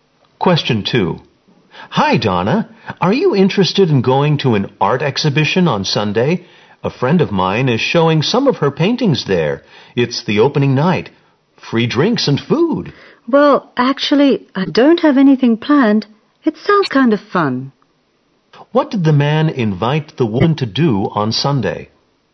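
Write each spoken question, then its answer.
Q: What did the man invite the woman to do on Sunday?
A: Go to an art exhibition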